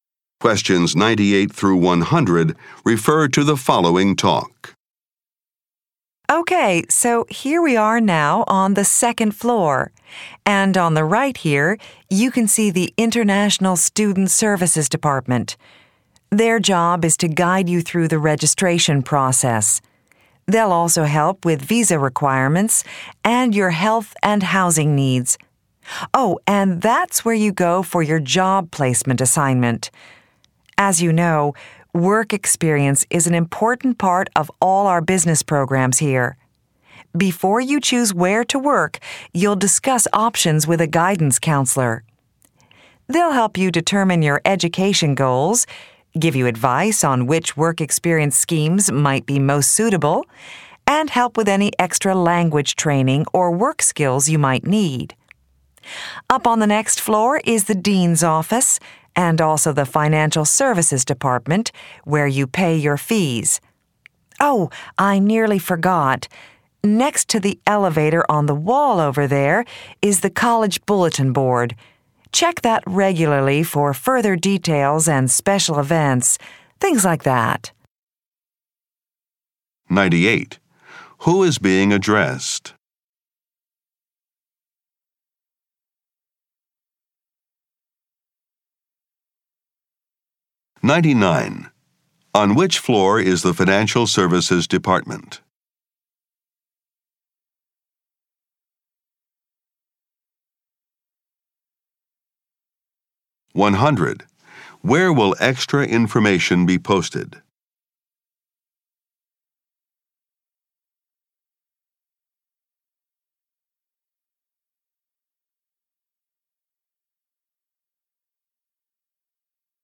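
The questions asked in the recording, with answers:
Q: Who is being addressed?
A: New international business students

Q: On which floor is the Financial Services Department?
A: The third floor

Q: Where will extra information be posted?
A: On the College Bulletin Board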